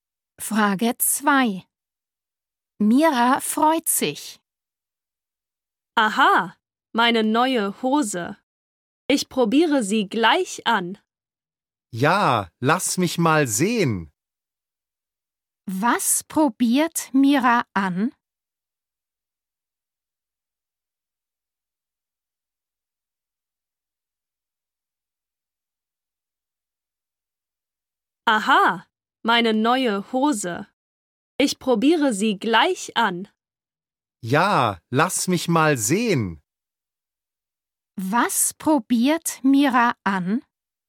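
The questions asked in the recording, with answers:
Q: Was probiert Mira an?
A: ihre neue Hose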